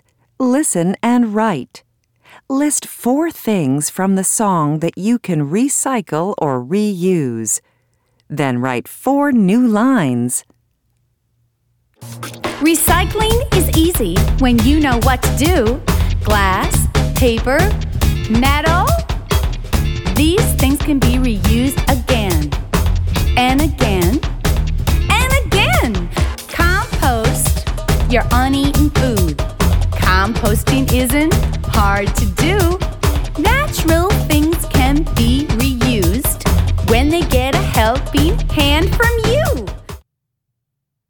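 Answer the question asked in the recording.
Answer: glass, paper, metal, uneaten food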